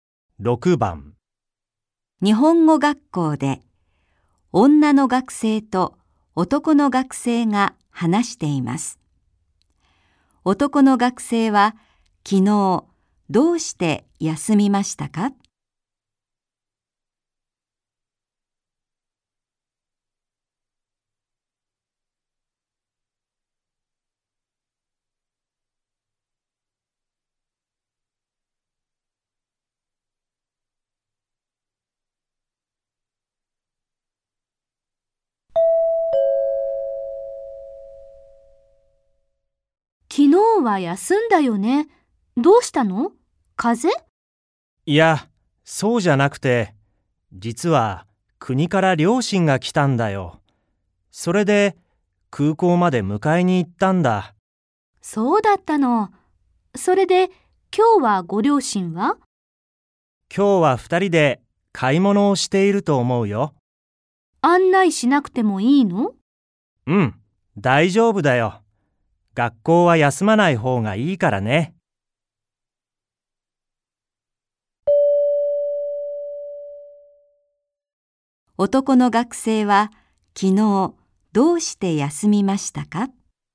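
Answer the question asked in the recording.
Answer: 両親を空港まで迎えに行ったから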